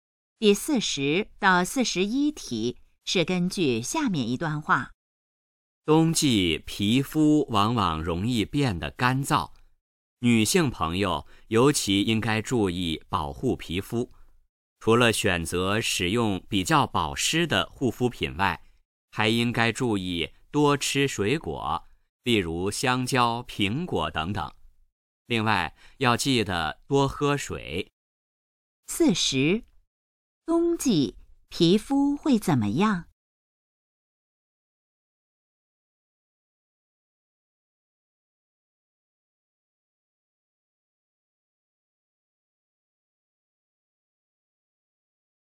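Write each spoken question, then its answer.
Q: 冬季皮肤会怎么样?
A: 变得干燥

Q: 根据这段话,怎样才能保护皮肤?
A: 用保湿护肤品、多吃水果、多喝水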